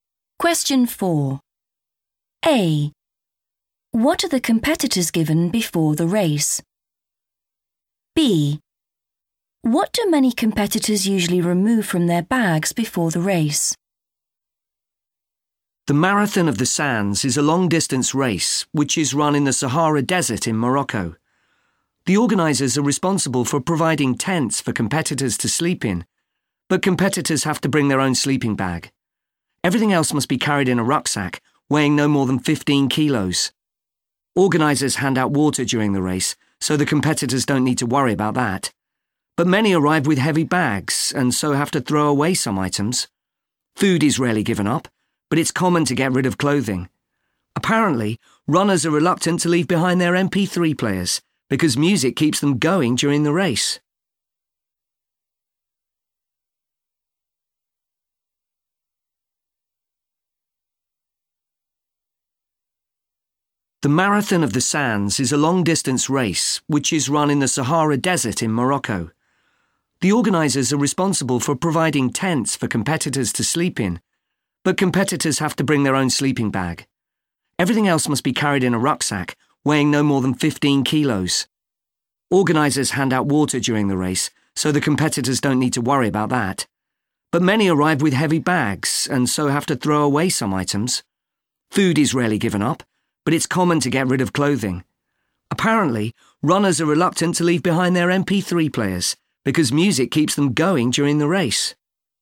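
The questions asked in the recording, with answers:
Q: What do many competitors usually remove from their bags before the race?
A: clothing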